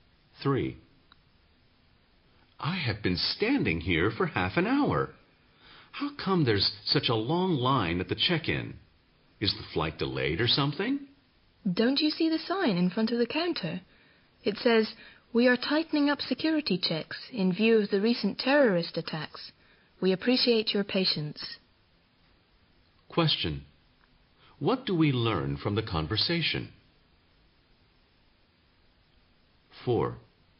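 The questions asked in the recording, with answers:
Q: What do we learn from the conversation?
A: The long line is due to tightened security checks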